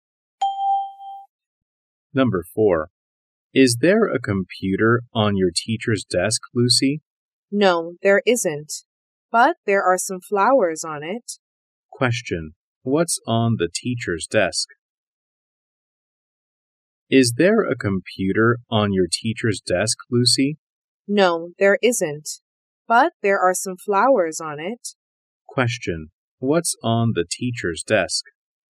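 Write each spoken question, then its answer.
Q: What's on the teacher's desk?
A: Some flowers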